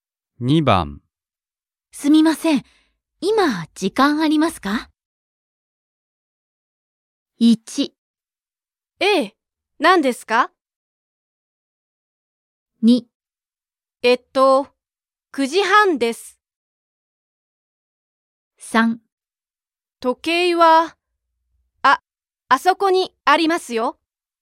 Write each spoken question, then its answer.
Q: すみません。今、時間ありますか?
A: 1. Choice 1. ええ。何ですか?